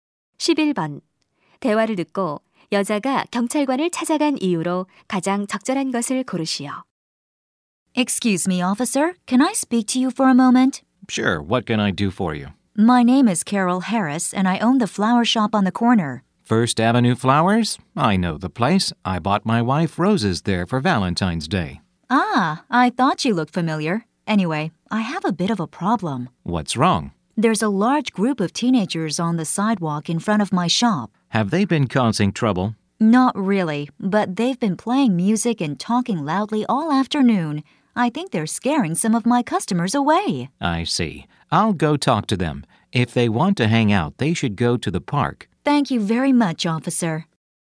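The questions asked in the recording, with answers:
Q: 대화를 듣고 여자가 경찰관을 찾아간 이유로 가장 적절한 것을 고르시오.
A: 가게 앞 십대들의 소음 때문에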